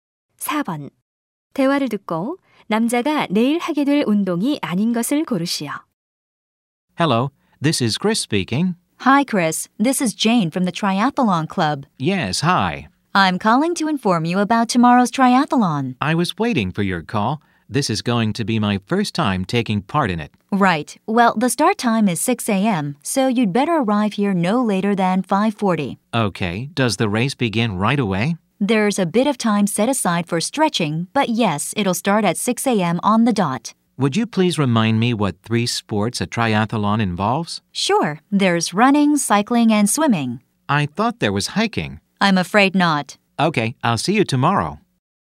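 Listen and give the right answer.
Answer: 하이킹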